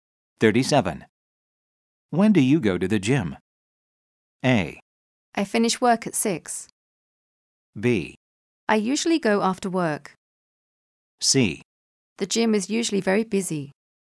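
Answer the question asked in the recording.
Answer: B: I usually go after work.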